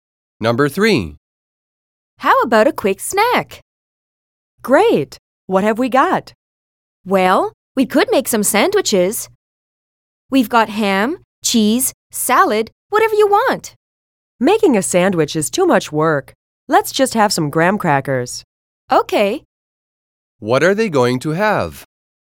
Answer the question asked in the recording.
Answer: They decided to have graham crackers.